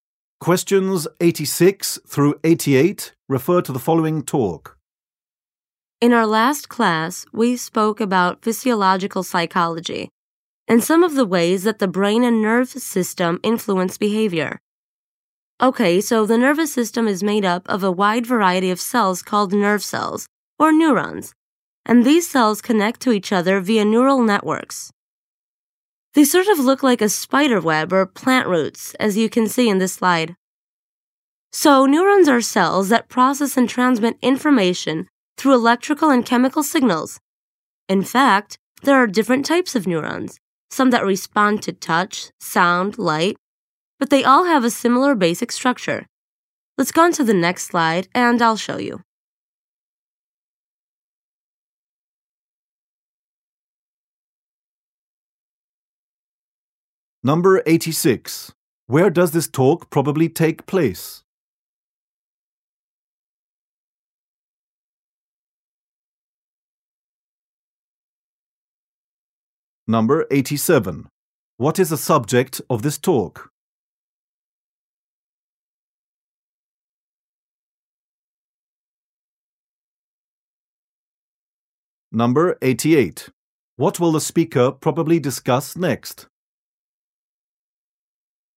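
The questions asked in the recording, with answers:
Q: Where does this talk probably take place?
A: In a classroom

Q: What is the subject of this talk?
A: Neurons in the nervous system

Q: What will the speaker probably discuss next?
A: The basic structure of neurons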